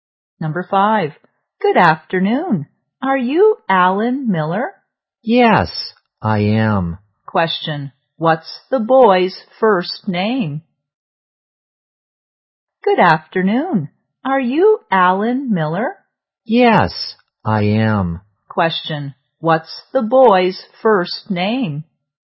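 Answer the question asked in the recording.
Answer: Alan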